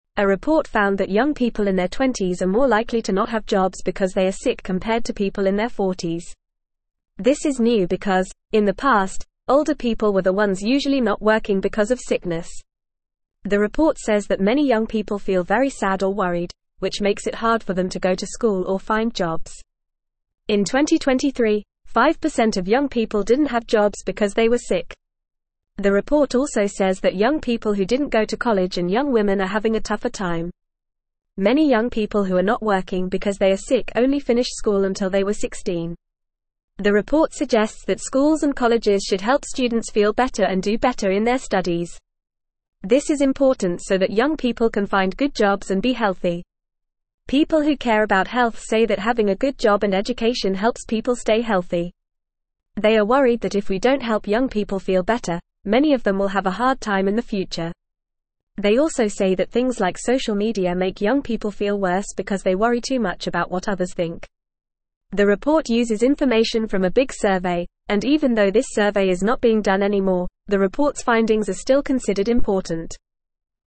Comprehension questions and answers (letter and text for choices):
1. A report found that young people in their 20s are more likely to not have jobs because they are sick (1)______ to people in their 40s.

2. This is new because, in the past, older people were the ones usually not working because of (2)______.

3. The report says that (3)______ young people feel very sad or worried, which makes it hard for them to go to school or find jobs.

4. In 2023, 5% of (4)______ people didn't have jobs because they were sick.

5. The report also says that young people who didn't go to college and young women are (5)______ a tougher time.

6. The report (6)______ that schools and colleges should help (7)______ feel better and do better in their studies.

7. The report (6)______ that schools and colleges should help (7)______ feel better and do better in their studies.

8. This is important so that young people can find good jobs and be (8)______.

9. They are (9)______ that if we don't help young people feel better, many of them will have a hard time in the (10)______.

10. They are (9)______ that if we don't help young people feel better, many of them will have a hard time in the (10)______.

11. They also say that things like social media make young people feel worse because they worry too much about what (11)______ think.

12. The report uses information from a big survey, and even though this survey is not being (12)______ anymore, the report's findings are still considered important.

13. According to the report, who is more likely to not have jobs because they are sick?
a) Young people in their 20s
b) Older people in their 40s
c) Young people in their 30s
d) Older people in their 60s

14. What is the percentage of young people who didn't have jobs because they were sick in 2023?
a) 10%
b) 5%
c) 15%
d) 20%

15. Who is having a tougher time finding jobs because they are sick, according to the report?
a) Young people who didn't go to college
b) Young people who finished school until they were 16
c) Young people who finished college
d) Young people who finished school until they were 18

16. What does the report suggest schools and colleges should do to help young people?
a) Give more homework to students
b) Help students feel better and do better in their studies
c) Make school and college more difficult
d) Stop offering support to students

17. What do people who care about health say helps people stay healthy?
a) Having a lot of money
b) Having a big house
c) Having a good job and education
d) Having many friends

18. What do people worry about if young people don't feel better?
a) They will become rich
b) They will become famous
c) They will have a lot of friends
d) They will have a hard time in the future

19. What makes young people feel worse, according to the report?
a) Going to school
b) Having a job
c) Talking to friends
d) Social media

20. What is the source of information for the report?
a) Interviews with young people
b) Information from the government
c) A big survey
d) Information from doctors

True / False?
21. A recent report found that young people in their 20s are more likely to be unemployed due to illness compared to older people.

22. In the past, it was usually older people who couldn't work because of sickness, but now it's less common among young people.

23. Health experts are pleased that if young people don't receive support to feel better, they may face difficulties in the future. They also believe that social media can contribute to young people feeling better because of excessive worry about others' opinions.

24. The report states that many young people feel happy or relaxed, which makes it difficult for them to go to school or find jobs.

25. The report shows that young people who didn't go to college and young women are facing more challenges in finding employment due to illness.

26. Many young people who are not working because they are sick only finished school until they were 16.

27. The report suggests that schools and colleges should hinder students feel better and perform better in their studies to improve their chances of finding good jobs and staying healthy.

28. In 2023, 5% of young people were unemployed because they were sick.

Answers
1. compared
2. sickness
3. many
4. young
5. having
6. suggests
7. students
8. healthy
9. worried
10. future
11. others
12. done
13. a) Young people in their 20s
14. b) 5%
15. a) Young people who didn't go to college
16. b) Help students feel better and do better in their studies
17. c) Having a good job and education
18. d) They will have a hard time in the future
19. d) Social media
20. c) A big survey
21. True
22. False
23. False
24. False
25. True
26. True
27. False
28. True

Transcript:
A report found that young people in their 20s are more likely to not have jobs because they are sick compared to people in their 40s. This is new because, in the past, older people were the ones usually not working because of sickness. The report says that many young people feel very sad or worried, which makes it hard for them to go to school or find jobs. In 2023, 5% of young people didn't have jobs because they were sick.
The report also says that young people who didn't go to college and young women are having a tougher time. The report suggests that schools and colleges should help students feel better and do better in their studies. This is important so that young people can find good jobs and be healthy.
People who care about health say that having a good job and education helps people stay healthy. They are worried that if we don't help young people feel better, many of them will have a hard time in the future. They also say that things like social media make young people feel worse because they worry too much about what others think. The report uses information from a big survey, and even though this survey is not being done anymore, the report's findings are still considered important.

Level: Level 2